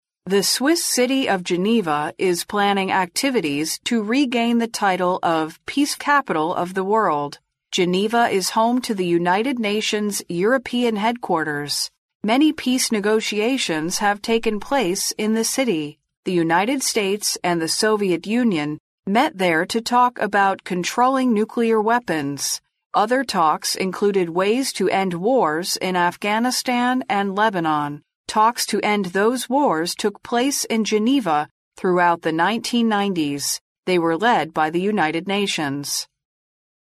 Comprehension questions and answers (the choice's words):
What is the title Geneva plans to regain?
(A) City of Negotiation.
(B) Peace Capital of the World.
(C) UN European Headquarters.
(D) Centre of Controlling Nuclear Weapons.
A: Peace Capital of the World.

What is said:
The Swiss city of the Geneva is planning activities to regain the title of"Peace Capital of the World". Geneva is home to the United Nations European headquarters. Many peace negotiations have taken place in the city. The United States and Soviet Union met there to talk about controlling nuclear weapons. Other talks included ways to end wars in Afghanistan and Lebanon. Talks to end those wars took place in Geneva throughout the 1990s. They were led by the United Nations.

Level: C类